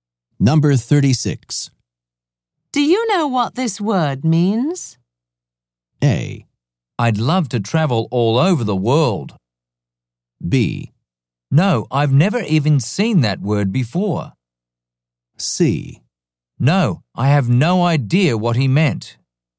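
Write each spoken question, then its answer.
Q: Do you know what this word means?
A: B: No, I've never even seen that word before.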